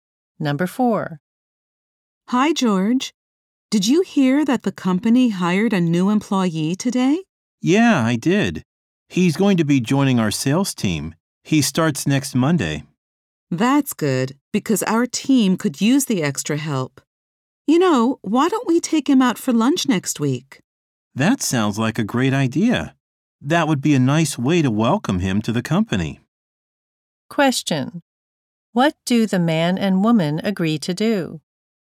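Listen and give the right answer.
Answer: Take the new employee out for lunch next week.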